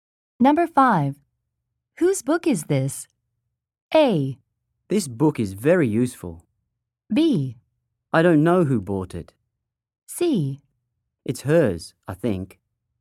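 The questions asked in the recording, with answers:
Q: Whose book is this?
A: C: It's hers, I think.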